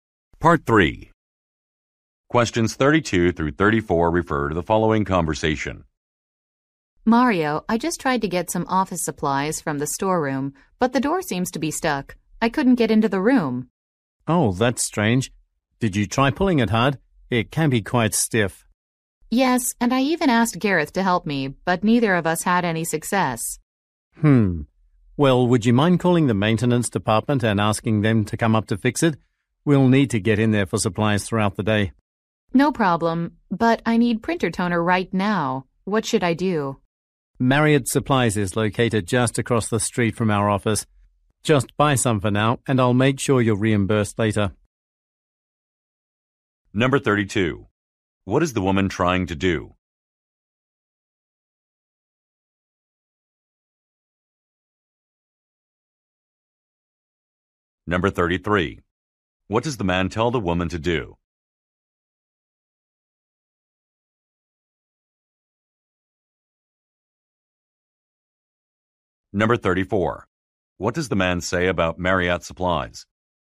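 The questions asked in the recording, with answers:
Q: What is the woman trying to do?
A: Get office supplies from the storeroom

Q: What does the man tell the woman to do?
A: Call the maintenance department to fix the door

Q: What does the man say about Marriott Supplies?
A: It is located just across the street from the office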